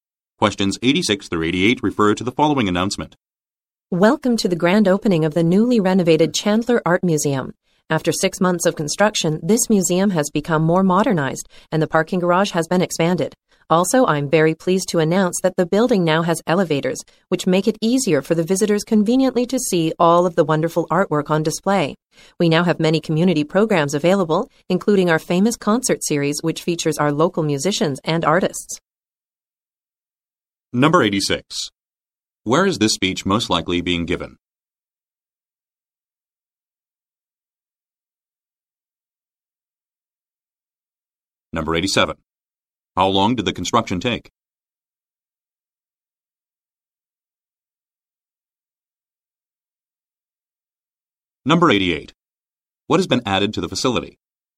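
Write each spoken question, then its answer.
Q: Where is this speech most likely being given?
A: At an art museum

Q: How long did the construction take?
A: 6 months

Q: What has been added to the facility?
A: Elevators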